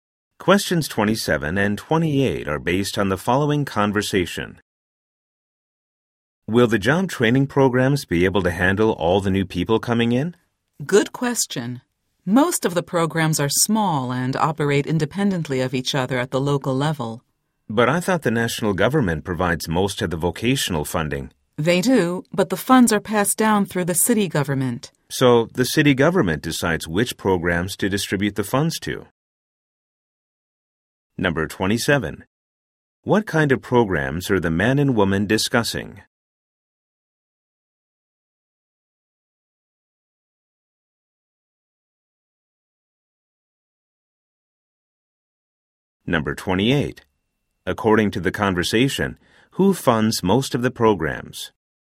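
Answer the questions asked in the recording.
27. Job training programs
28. The national government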